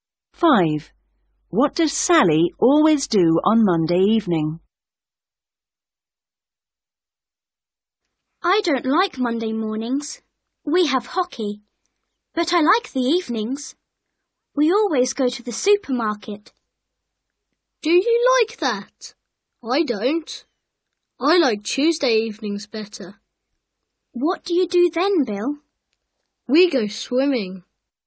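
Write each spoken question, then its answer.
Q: What does Sally always do on Monday evening?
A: goes to the supermarket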